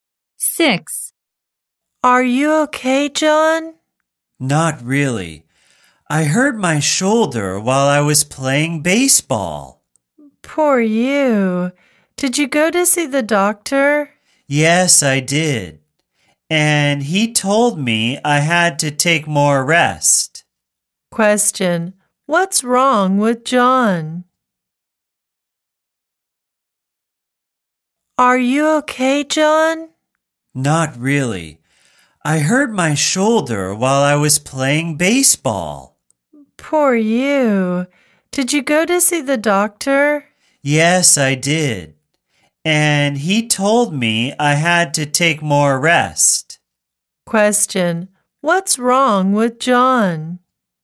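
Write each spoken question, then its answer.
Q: Question, what's wrong with John?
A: He hurt his shoulder while playing baseball.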